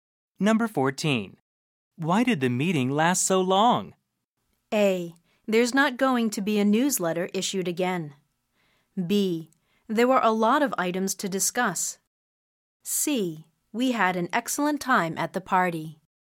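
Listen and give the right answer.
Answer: B: There were a lot of items to discuss.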